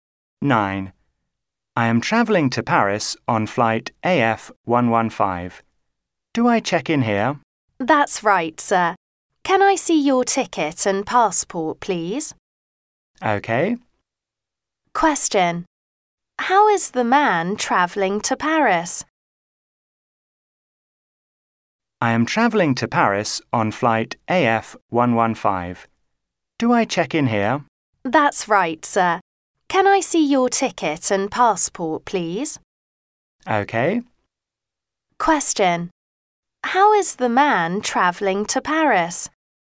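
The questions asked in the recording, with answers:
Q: How is the man travelling to Paris?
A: By plane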